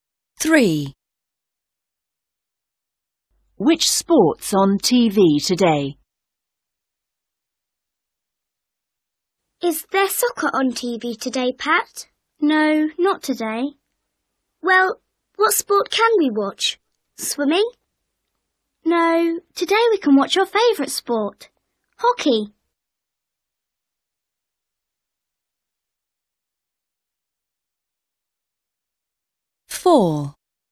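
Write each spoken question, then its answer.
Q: Which sport's on TV today?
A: Hockey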